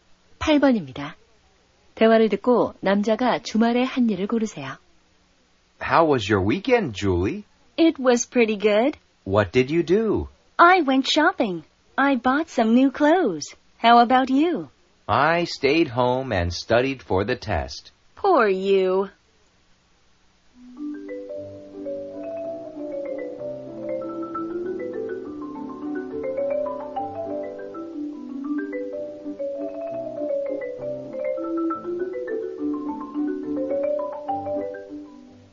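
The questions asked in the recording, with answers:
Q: 대화를 듣고 남자가 주말에 한 일을 고르세요.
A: 집에서 시험 공부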